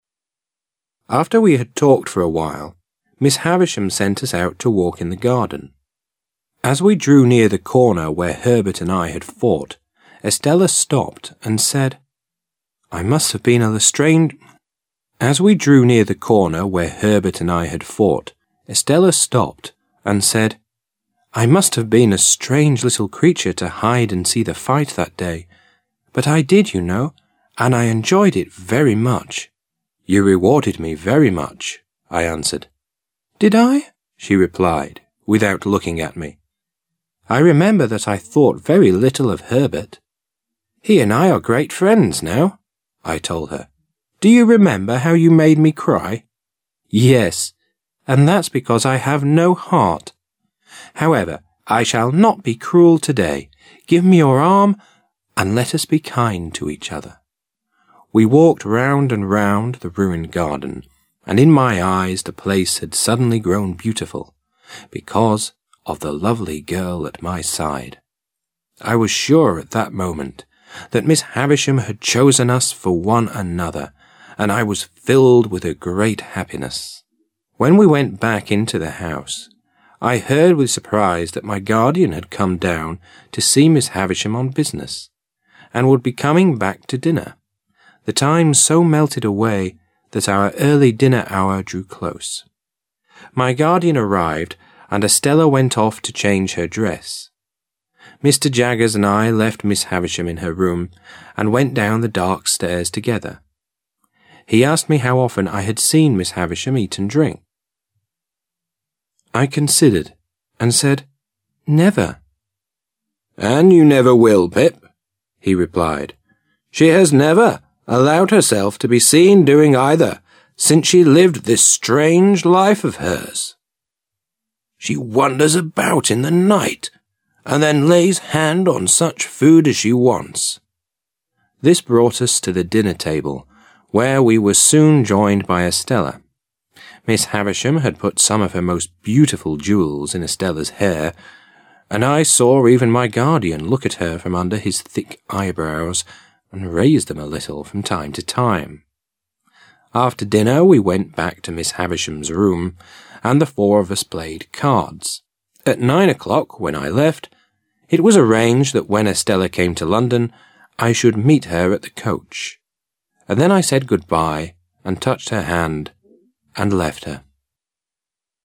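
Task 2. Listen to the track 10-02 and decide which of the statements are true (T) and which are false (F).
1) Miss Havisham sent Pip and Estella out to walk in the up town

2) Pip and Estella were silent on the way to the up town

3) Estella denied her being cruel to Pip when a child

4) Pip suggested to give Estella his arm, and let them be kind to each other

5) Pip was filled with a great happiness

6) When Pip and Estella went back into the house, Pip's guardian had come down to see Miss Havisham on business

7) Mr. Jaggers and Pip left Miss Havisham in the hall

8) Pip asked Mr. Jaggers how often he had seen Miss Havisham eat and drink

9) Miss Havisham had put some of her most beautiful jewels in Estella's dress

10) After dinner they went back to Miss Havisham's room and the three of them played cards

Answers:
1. F
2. F
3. F
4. F
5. T
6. T
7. F
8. F
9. F
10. F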